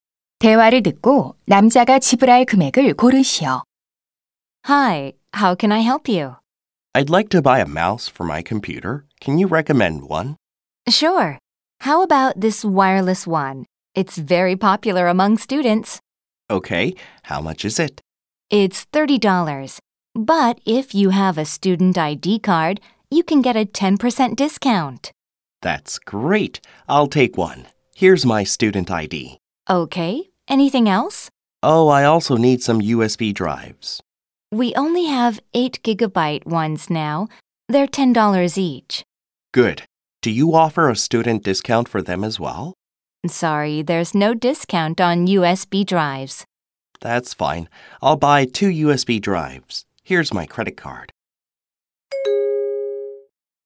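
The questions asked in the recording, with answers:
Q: 9번 대화를 듣고 남자가 지불할 금액을 고르시오.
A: $47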